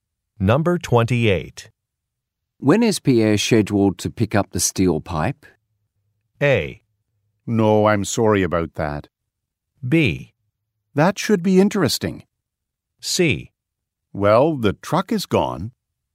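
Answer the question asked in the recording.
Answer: C: Well, the truck is gone.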